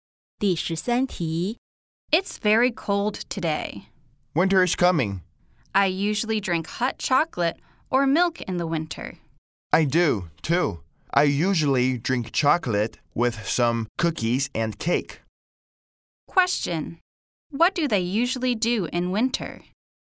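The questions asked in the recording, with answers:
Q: What do they usually do in winter?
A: They drink hot chocolate.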